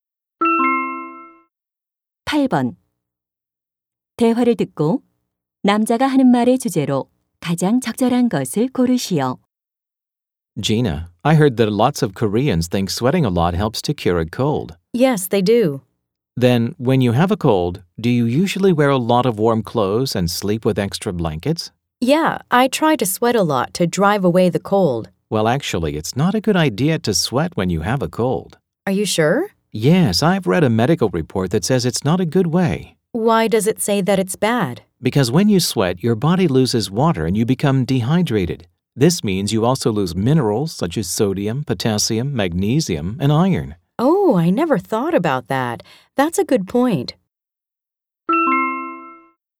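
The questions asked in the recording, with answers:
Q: 대화를 듣고 남자가 하는 말의 주제로 가장 적절한 것을 고르시오.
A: 감기에 걸렸을 때 땀을 많이 흘리는 것은 좋지 않다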